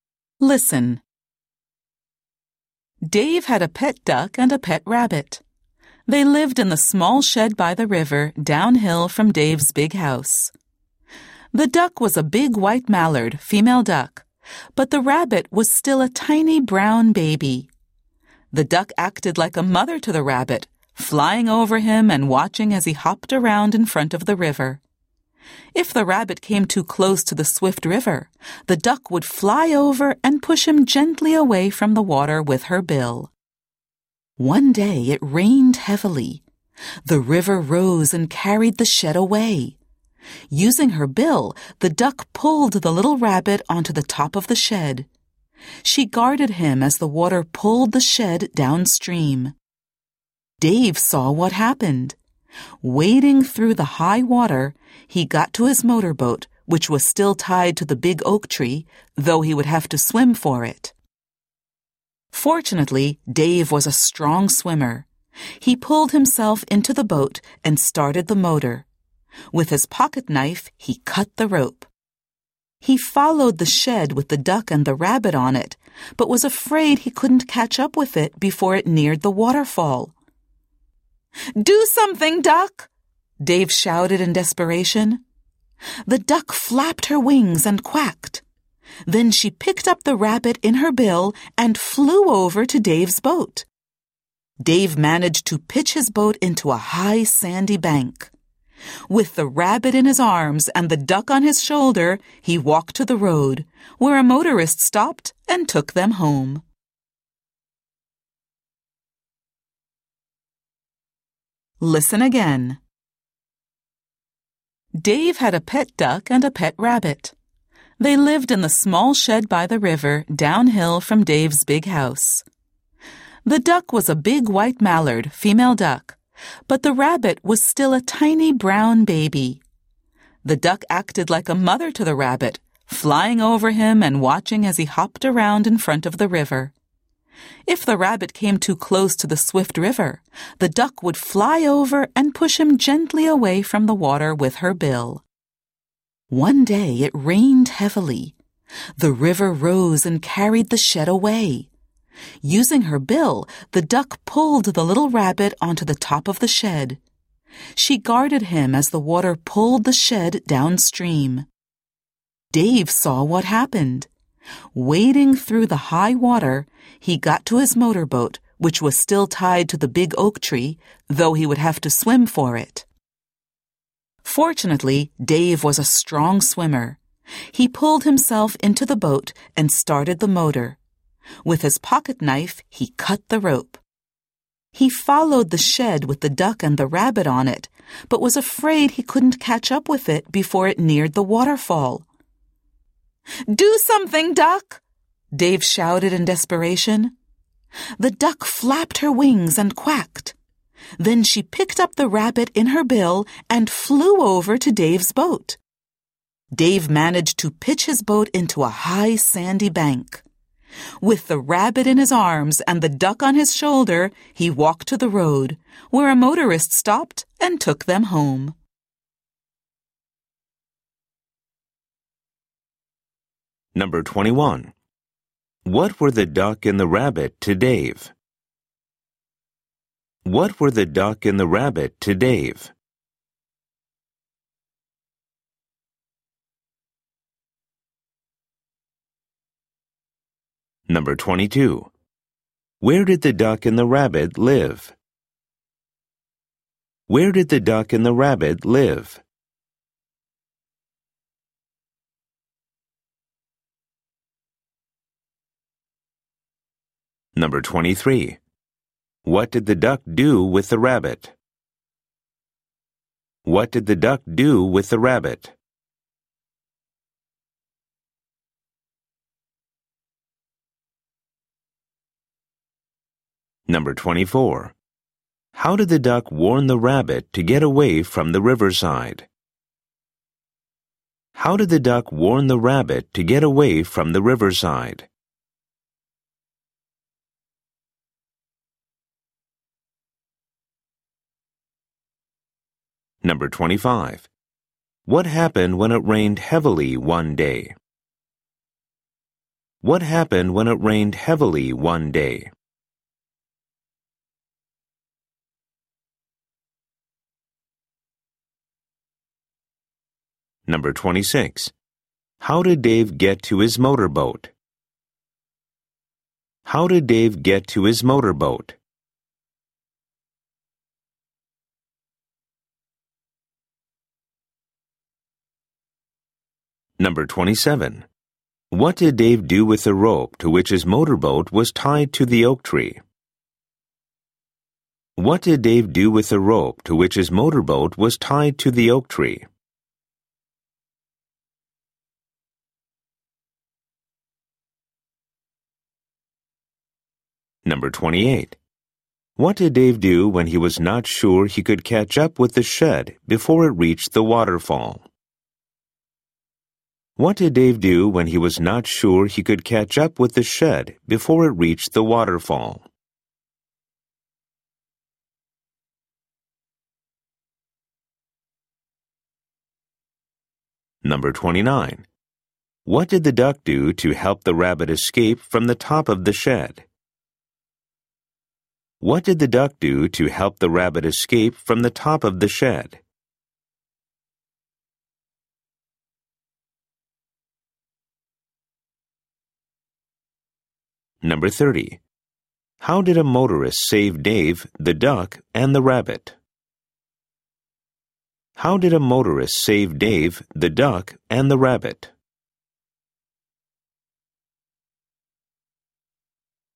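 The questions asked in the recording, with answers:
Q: What were the duck and the rabbit to Dave?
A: His pets

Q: Where did the duck and the rabbit live?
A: In a small shed by the river, downhill from Dave's house

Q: What did the duck do with the rabbit?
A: She acted like a mother to him, watching over him

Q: How did the duck warn the rabbit to get away from the riverside?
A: She flew over and gently pushed him away with her bill

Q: What happened when it rained heavily one day?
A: The river rose and carried the shed away

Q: How did Dave get to his motorboat?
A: He waded through the high water and swam

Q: What did Dave do with the rope to which his motorboat was tied to the oak tree?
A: He cut it with his pocket knife

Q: What did Dave do when he was not sure he could catch up with the shed before it reached the waterfall?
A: He shouted, "Do something, duck!"

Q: What did the duck do to help the rabbit escape from the top of the shed?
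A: She picked him up in her bill and flew to Dave's boat

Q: How did a motorist save Dave, the duck, and the rabbit?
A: He stopped and took them home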